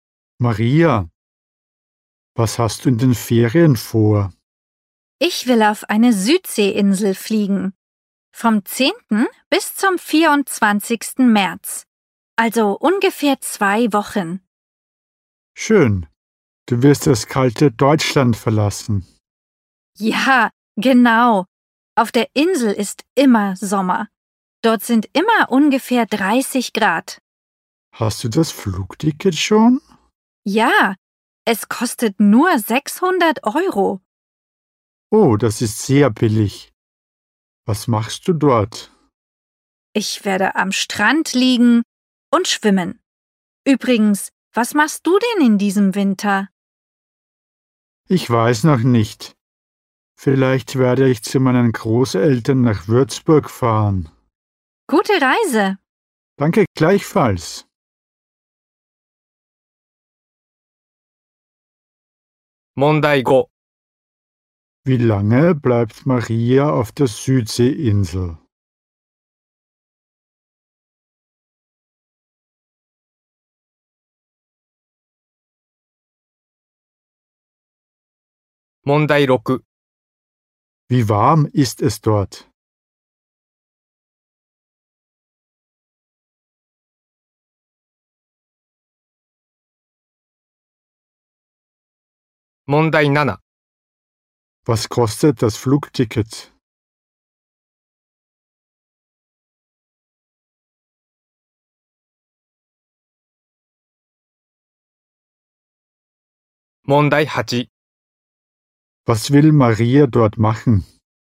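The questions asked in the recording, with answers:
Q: Wie lange bleibt Maria auf der Südseeinsel?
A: Ungefähr 2 Wochen (vom 10. bis zum 24. März)

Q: Wie warm ist es dort?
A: Ungefähr 30 Grad

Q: Was kostet das Flugticket?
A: 600 Euro

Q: Was will Maria dort machen?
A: Am Strand liegen und schwimmen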